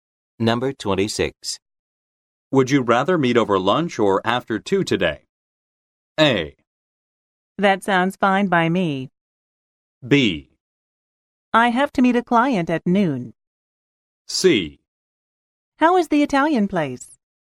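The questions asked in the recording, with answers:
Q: Would you rather meet over lunch or after 2 today?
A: B: I have to meet a client at noon.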